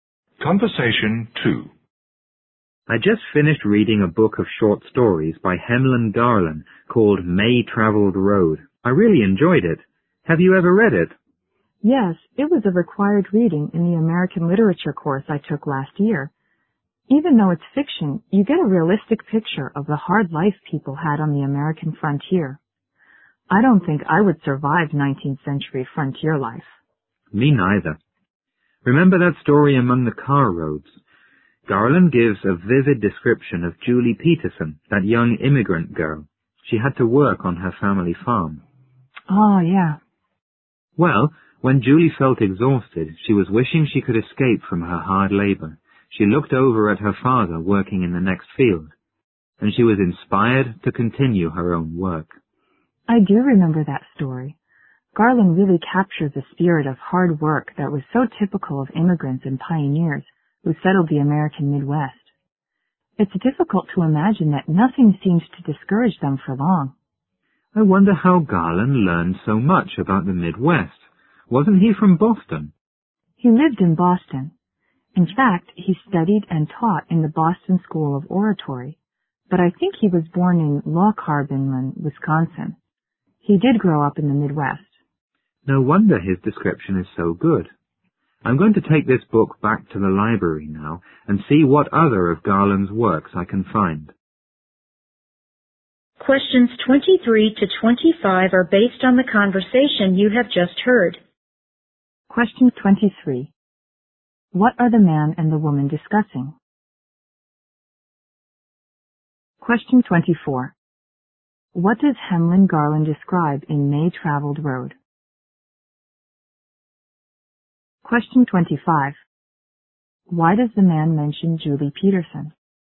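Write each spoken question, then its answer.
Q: What are the man and the woman discussing?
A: A book of short stories by Hamlin Garland (Main-Travelled Roads)

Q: What does Hemlyn Garland describe in May Traveled Road?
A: The hard life of people on the American frontier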